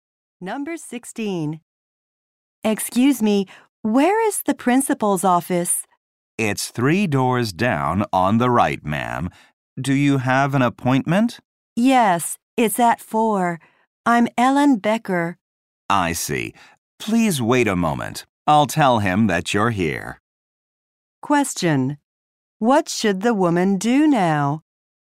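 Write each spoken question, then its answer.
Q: What should the woman do now?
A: Wait a moment.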